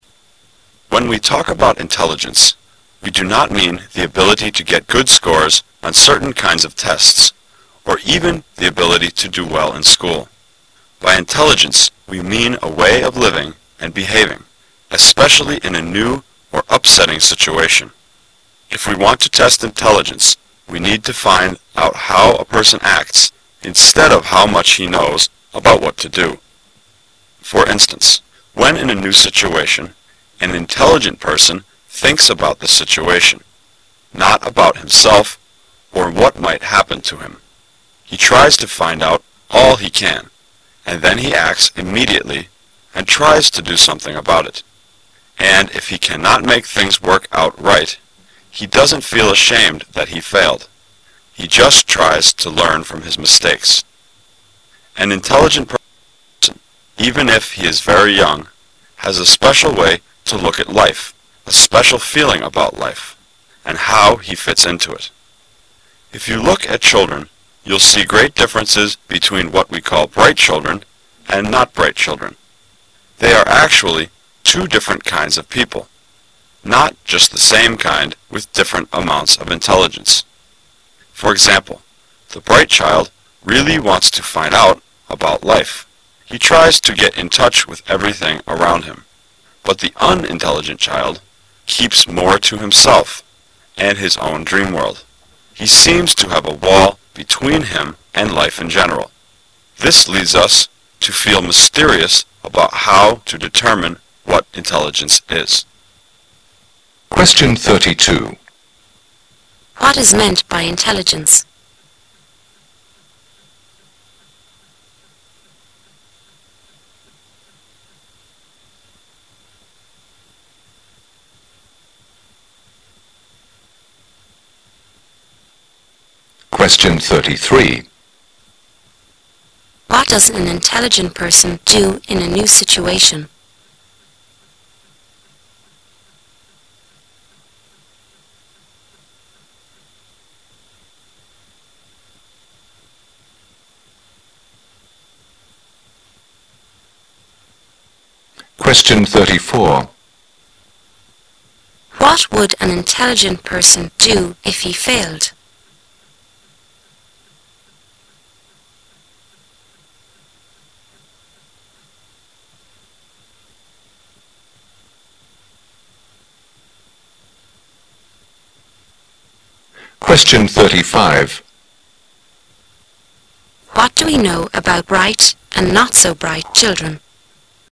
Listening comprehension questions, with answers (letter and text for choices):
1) What does an intelligent person do in a new situation?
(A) He learns more about what might happen to him.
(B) He thinks about the situation and what to do about it.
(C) He cares more about himself.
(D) He is sure of the result he will get.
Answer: (B) He thinks about the situation and what to do about it.

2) What would an intelligent person do if he failed?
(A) He would feel ashamed.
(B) He would give up trying again.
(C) He would lose confidence in himself.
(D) He would learn from his experiences.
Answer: (D) He would learn from his experiences.

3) What do we know about bright and not-so-bright children?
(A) They are two different types of children.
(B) Both of the two kinds are very quiet.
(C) They only have different ways of thinking.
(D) They have different knowledge about the world.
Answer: (A) They are two different types of children.

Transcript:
[解析] 32-35 When we talk about intelligence, we do not mean the ability to get good scores on certain kinds of tests or even the ability to do well in school. By intelligence we mean a way of living and behaving, especially in a new or upsetting situation. If we want to test intelligence we need to find out how a person acts instead of how much he knows about what to do. For instance, when in a new situation, an intelligent person thinks about the situation, not about himself or what might happen to him. He tries to find ont all he can, and then he acts immediately and tries to do something about it. And if he cannot make things work out right, he doesn't feel ashamed that he failed, he just turns to learn from his mistakes. An intelligent person, even if he is very young, has a special way to look at life, a special feeling about life, and how he fits into it. If you look at children, you'll see great differences between what we call "bright" children and "not bright" children. They are actually two different kinds of people, not just the same kind with different amounts of intelligence. For example, the bright child really wants to find out about life--he tries to get in touch with everything around him. But the unintelligent child keeps more to himself and his own dream world: he seems to have a wall between him and life in general. This leads us to feel mysterious about how to determine what intelligence is. What is meant by "intelligence"?